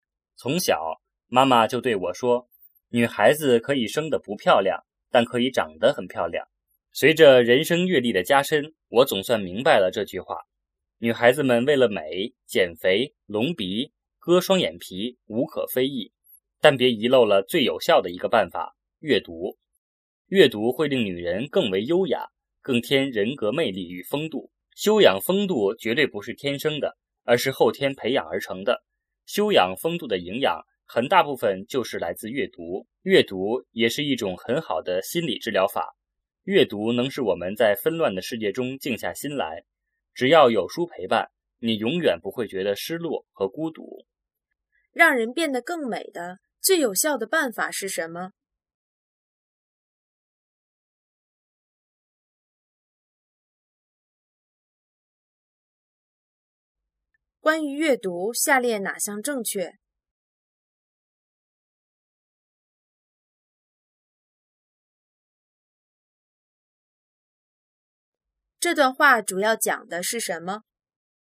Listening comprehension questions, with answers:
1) 关于阅读,下列哪项正确?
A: 阅读能让人更有风度

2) 这段话主要讲的是什么?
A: 阅读的好处

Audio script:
从小,妈妈就对我说:"女孩子可以生得不漂亮,但可以长得很漂亮。"随着人生阅历的加深,我总算明白了这句话。女孩子们为了美,减肥、隆鼻、割双眼皮,无可非议,但别遗漏了最有效的一个办法:阅读。阅读会令女人更为优雅,更添人格魅力与风度。修养风度绝对不是天生的,而是后天培养而成的。修养风度的营养,很大部分就是来自阅读。阅读也是一种很好的心理治疗法,阅读能使我们在纷乱的世界中静下心来。只要有书陪伴,你永远不会觉得失落和孤独。
让人变得更美的最有效的办法是什么?

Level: 汉语水平考试(HSK)五级